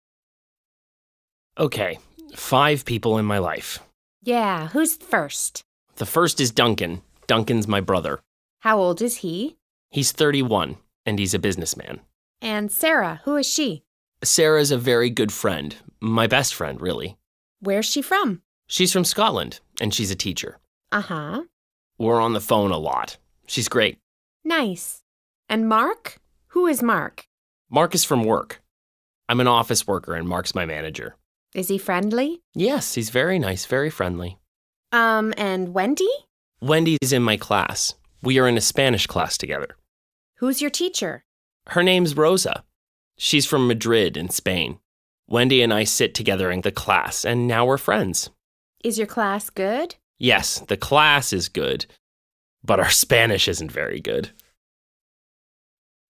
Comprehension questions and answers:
A. Listen to Jo talk about five people in her life. Match the names with people 1—5.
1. a person in her family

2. a student in her class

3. a good friend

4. her teacher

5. a person at her work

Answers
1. Duncan
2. Wendy
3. Sarah
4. Rosa
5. Mark